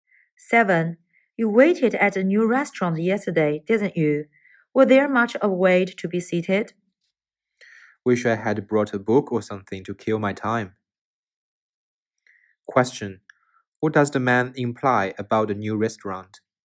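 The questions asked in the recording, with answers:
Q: What does the man imply about the new restaurant?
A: There was a long wait to be seated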